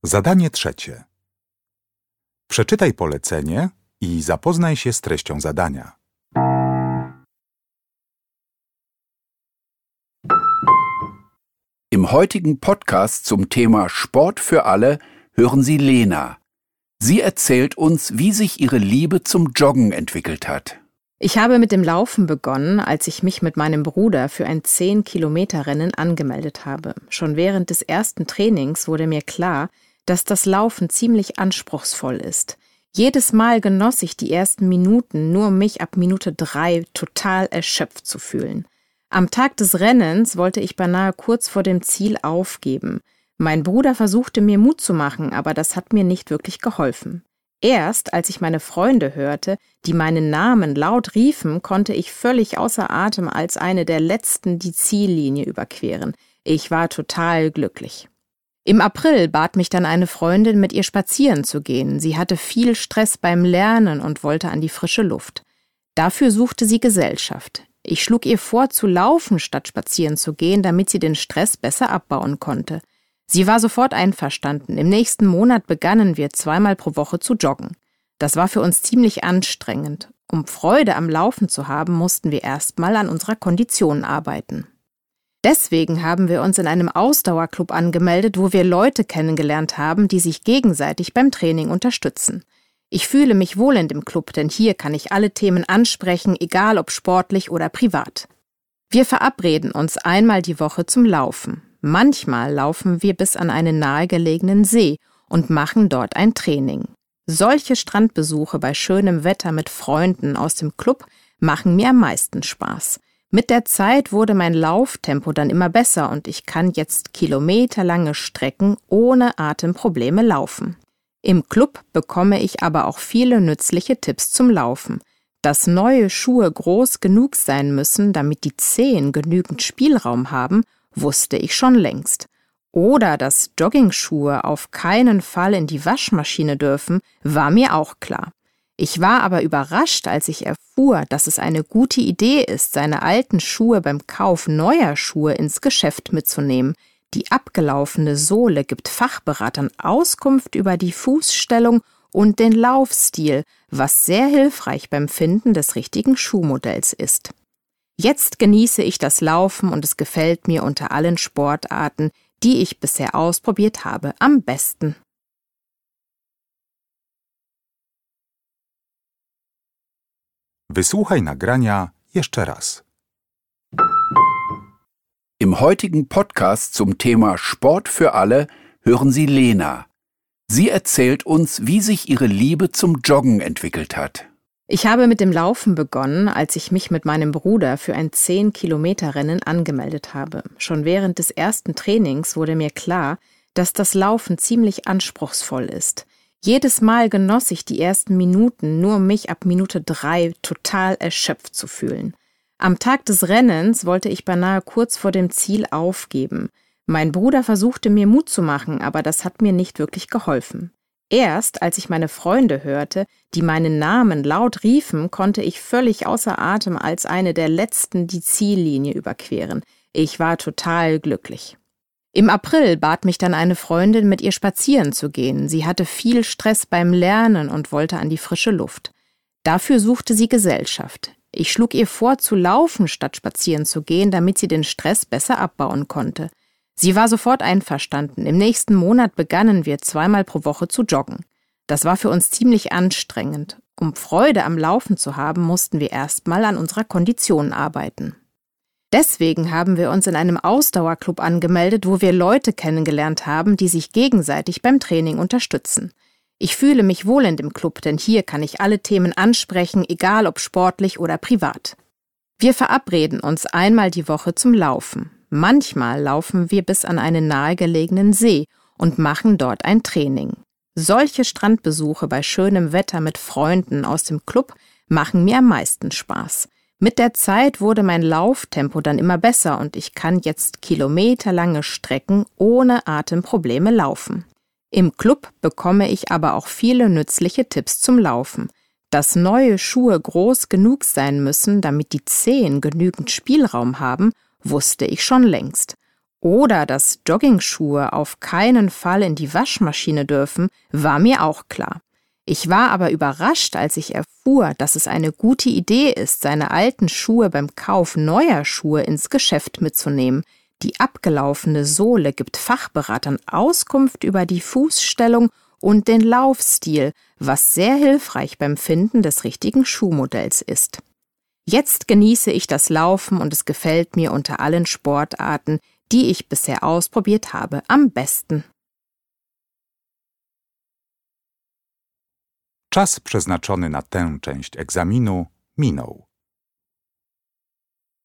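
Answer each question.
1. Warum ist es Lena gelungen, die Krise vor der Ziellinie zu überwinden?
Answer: Weil ihre Freunde laut ihren Namen riefen.

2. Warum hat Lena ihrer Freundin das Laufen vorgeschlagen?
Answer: Damit die Freundin den Stress besser abbauen konnte.

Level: Poziom: rozszerzony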